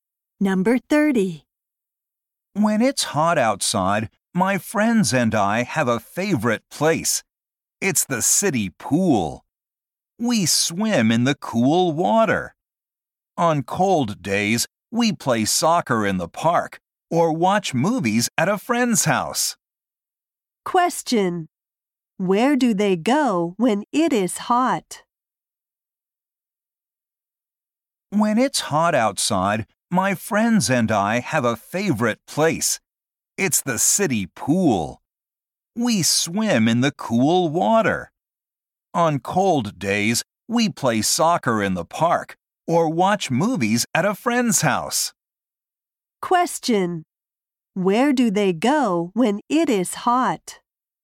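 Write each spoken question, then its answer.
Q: Where do they go when it is hot?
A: The city pool.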